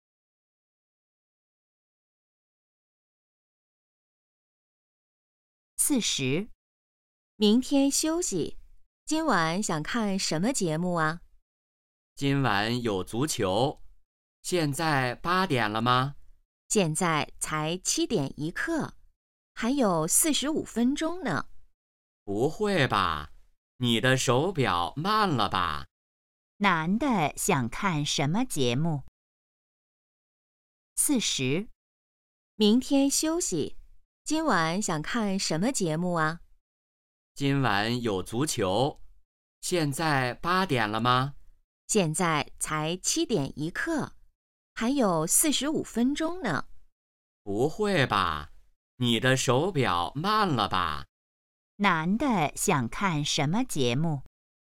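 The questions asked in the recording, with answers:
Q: 男的想看什么节目?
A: 足球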